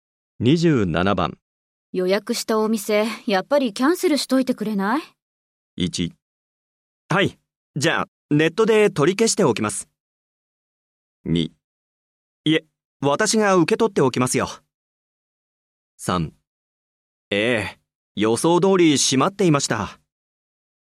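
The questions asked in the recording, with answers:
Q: 予約したお店、やっぱりキャンセルしといてくれない?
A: 1: はい、じゃあネットで取り消しておきます。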